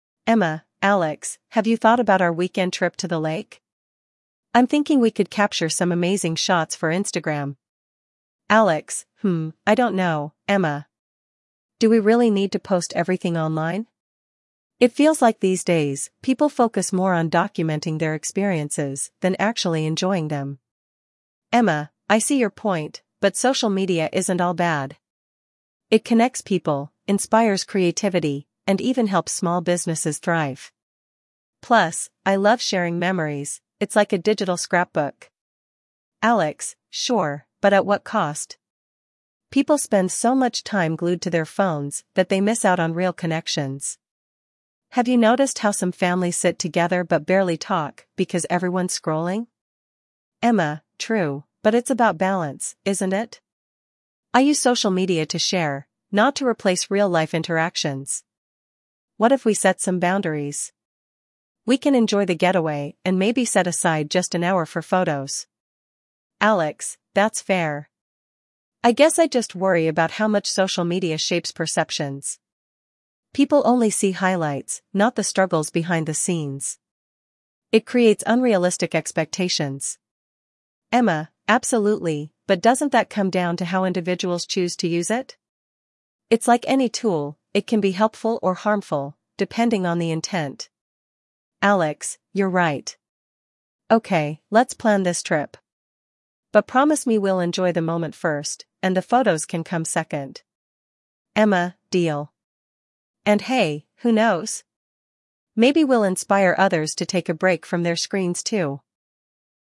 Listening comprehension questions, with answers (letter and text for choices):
3.Choose the best answer to each question.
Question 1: What is Emma's main reason for wanting to take photos during the trip?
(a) To enter a photography competition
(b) To create content for Instagram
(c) To document the struggles behind the scenes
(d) To promote a small business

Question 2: What concern does Alex express about social media?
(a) It distracts people from professional work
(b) It causes families to lose money on vacations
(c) It replaces real-life connections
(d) It promotes harmful businesses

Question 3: How does Emma propose to balance social media use during the trip?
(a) By avoiding phones altogether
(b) By setting aside specific time for photos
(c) By only taking candid shots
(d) By turning off notifications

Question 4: According to Alex, what is one negative effect of social media?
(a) It limits creativity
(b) It creates unrealistic expectations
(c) It fails to connect people globally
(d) It discourages outdoor activities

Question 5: How does the conversation conclude regarding their use of social media?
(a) Alex decides not to go on the trip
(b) Emma agrees to leave her phone at home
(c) They agree to focus on the moment first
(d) They decide to cancel the trip entirely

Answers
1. (b) To create content for Instagram
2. (c) It replaces real-life connections
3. (b) By setting aside specific time for photos
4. (b) It creates unrealistic expectations
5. (c) They agree to focus on the moment first

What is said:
Emma: Alex, have you thought about our weekend trip to the lake? I'm thinking we could capture some amazing shots for Instagram!
Alex: Hmm, I don't know, Emma. Do we really need to post everything online? It feels like these days, people focus more on documenting their experiences than actually enjoying them.
Emma: I see your point, but social media isn't all bad. It connects people, inspires creativity, and even helps small businesses thrive. Plus, I love sharing memories—it's like a digital scrapbook!
Alex: Sure, but at what cost? People spend so much time glued to their phones that they miss out on real connections. Have you noticed how some families sit together but barely talk because everyone's scrolling?
Emma: True, but it's about balance, isn't it? I use social media to share, not to replace real-life interactions. What if we set some boundaries? We can enjoy the getaway and maybe set aside just an hour for photos.
Alex: That's fair. I guess I just worry about how much social media shapes perceptions. People only see highlights, not the struggles behind the scenes.
Emma: Absolutely, but doesn't that come down to how individuals choose to use it? It's like any tool—it can be helpful or harmful, depending on the intent.
Alex: You're right. Okay, let's plan this trip. But promise me we'll enjoy the moment first, and the photos can come second.
Emma: Deal. And hey, who knows? Maybe we'll inspire others to take a break from their screens too!